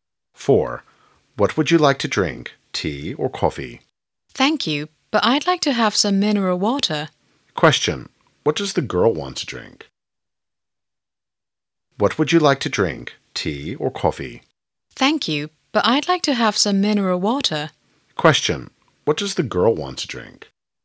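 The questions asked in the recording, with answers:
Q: What does the girl want to drink?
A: Mineral water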